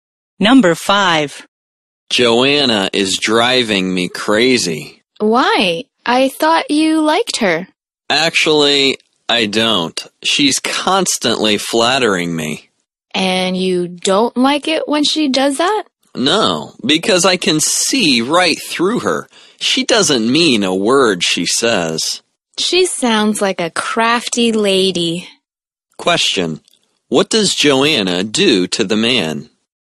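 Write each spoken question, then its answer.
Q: What does Joanna do to the man?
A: She constantly flatters him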